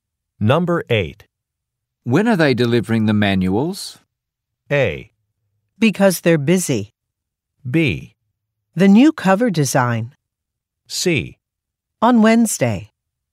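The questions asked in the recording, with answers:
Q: When are they delivering the manuals?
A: C: On Wednesday.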